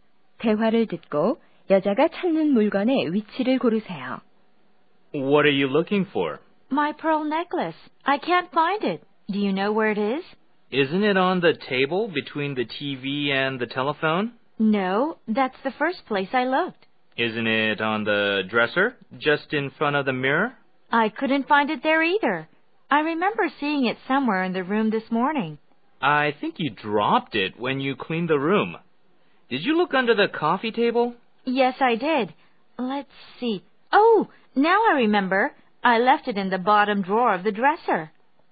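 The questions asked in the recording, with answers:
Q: 대화를 듣고 여자가 찾는 물건의 위치를 고르세요.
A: 화장대 맨 아래 서랍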